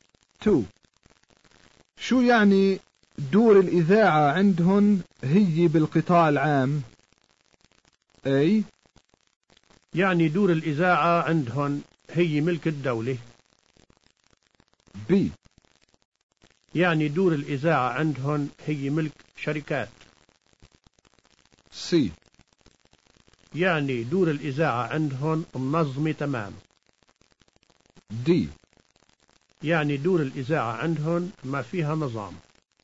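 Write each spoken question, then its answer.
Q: شو يعني دور الإذاعة عندهن هي بالقطاع العام؟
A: A: يعني دور الإذاعة عندهن هي ملك الدولة.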